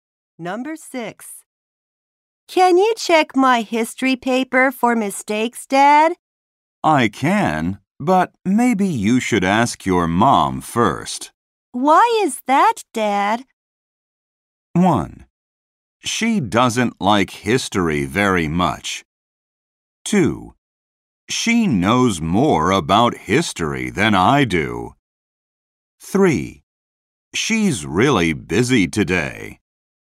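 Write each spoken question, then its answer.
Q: Why is that, Dad?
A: 2: She knows more about history than I do.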